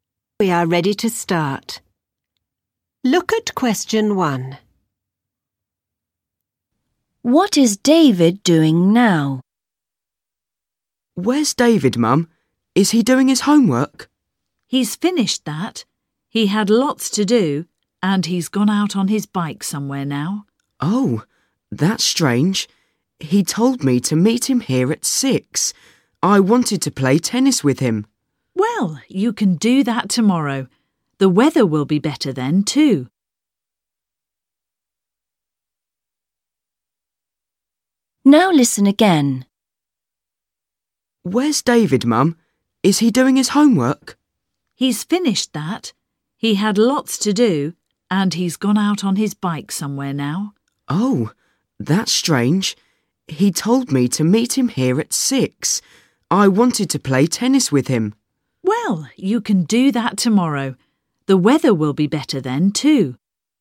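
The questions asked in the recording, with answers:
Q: What is David doing now?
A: riding his bike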